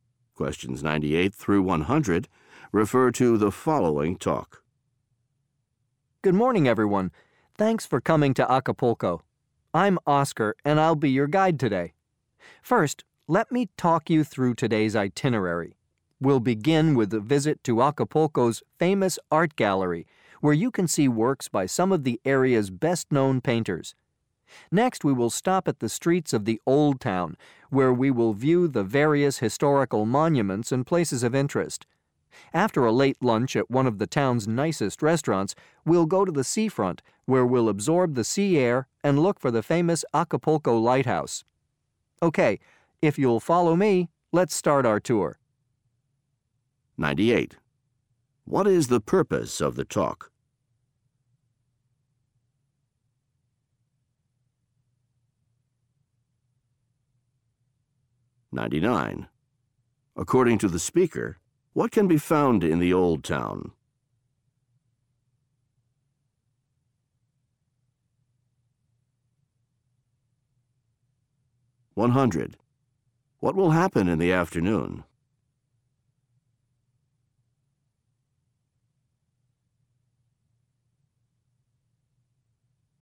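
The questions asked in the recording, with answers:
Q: What is the purpose of the talk?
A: To explain the day's tour itinerary

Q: According to the speaker, what can be found in the Old Town?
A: Historical monuments

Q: What will happen in the afternoon?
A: They will go to the seafront to look for the lighthouse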